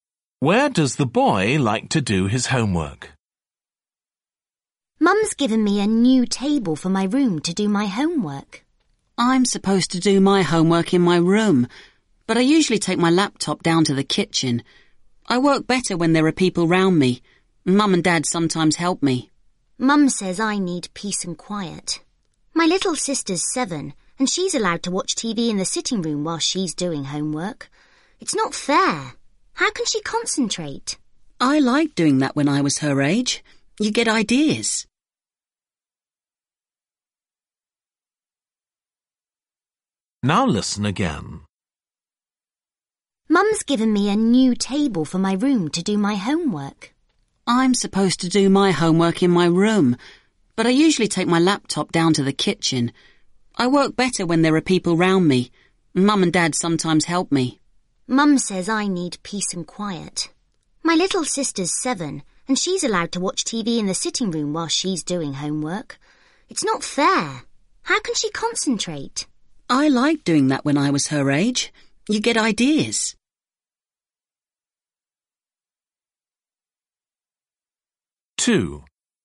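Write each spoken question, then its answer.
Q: Where does the boy like to do his homework?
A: In the kitchen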